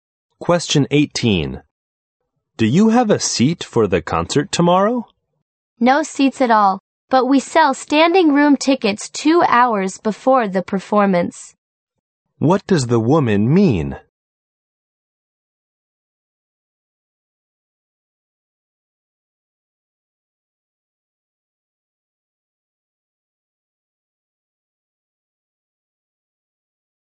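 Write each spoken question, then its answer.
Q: What does the woman mean?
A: No seats are left; only standing-room tickets will be sold 2 hours before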